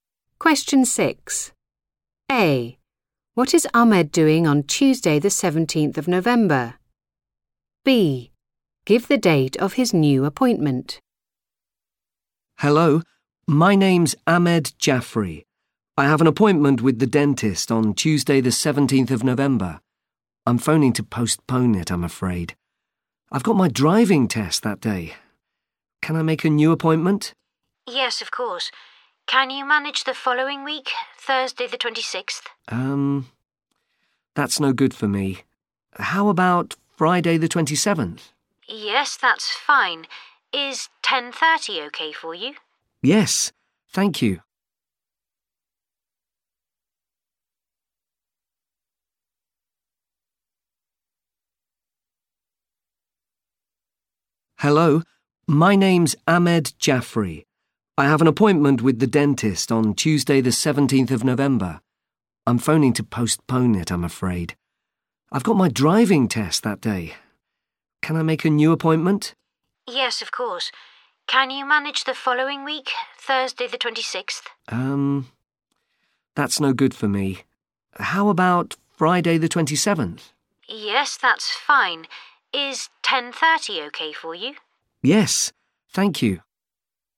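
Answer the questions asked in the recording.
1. taking his driving test
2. Friday 27th November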